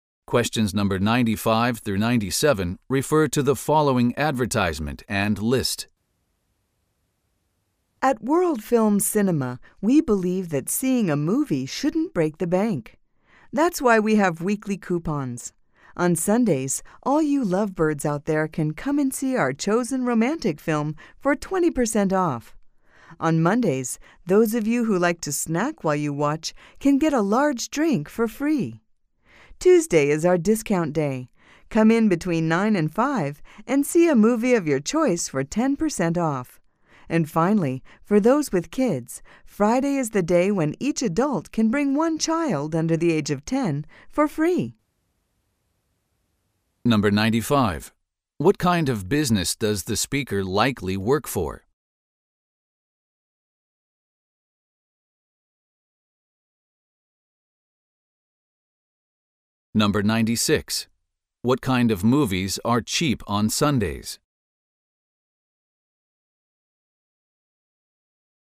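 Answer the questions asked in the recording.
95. A movie theater
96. Romantic films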